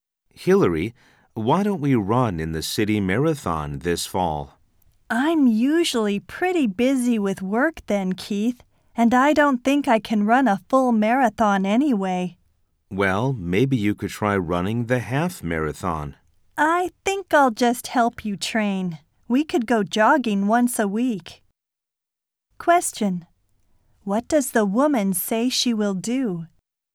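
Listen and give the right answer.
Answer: Help the man train for the marathon (go jogging with him once a week).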